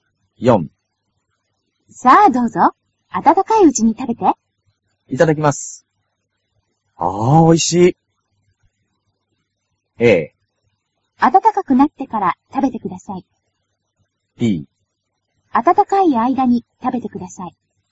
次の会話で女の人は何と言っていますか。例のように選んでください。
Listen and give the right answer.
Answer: b

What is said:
女:さあ、どうぞ。温かいうちに食べて。
男:いただきます。ああ、おいしい。
a. 温かくなってから、食べてください。
b. 温かい間に、食べてください。

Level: cơ bản